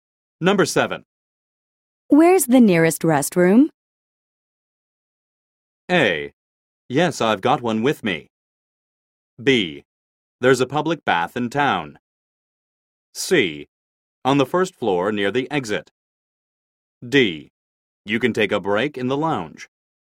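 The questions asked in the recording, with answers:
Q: Where's the nearest restroom?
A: C: On the first floor near the exit.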